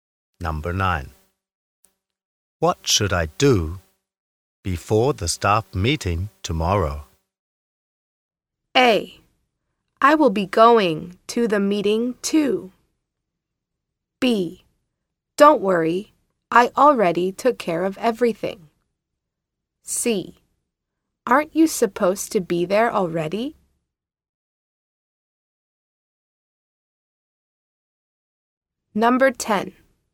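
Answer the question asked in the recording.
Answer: B: Don't worry, I already took care of everything.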